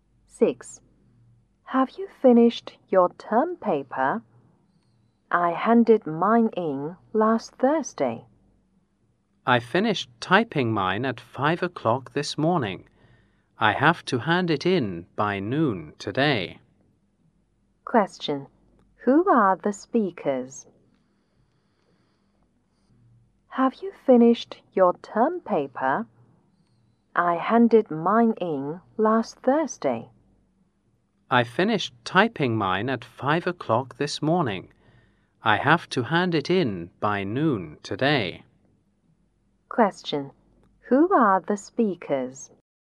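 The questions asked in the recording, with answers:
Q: Question. Who are the speakers?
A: Students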